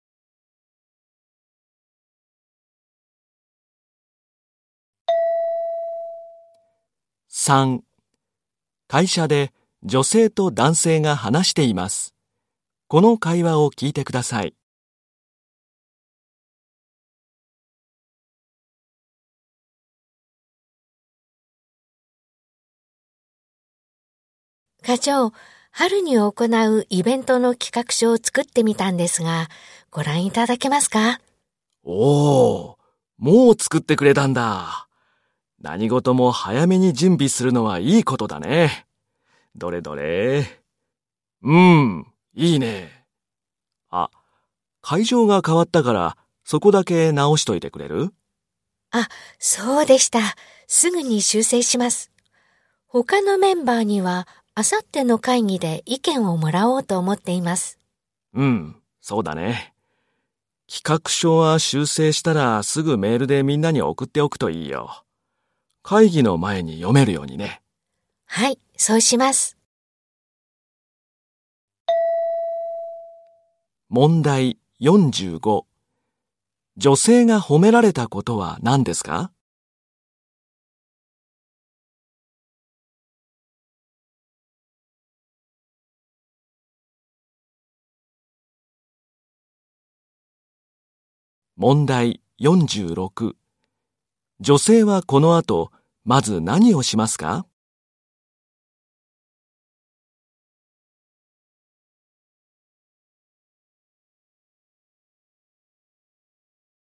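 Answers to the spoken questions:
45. 企画書を早めに作ったこと
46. 企画書の会場を修正する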